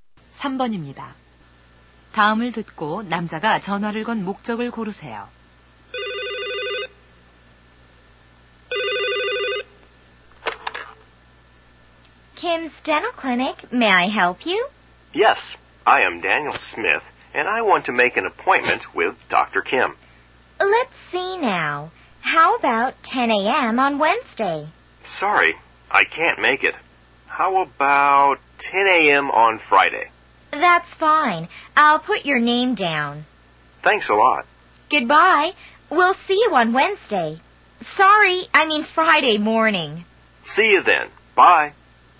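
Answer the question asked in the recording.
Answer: 치과 진료 예약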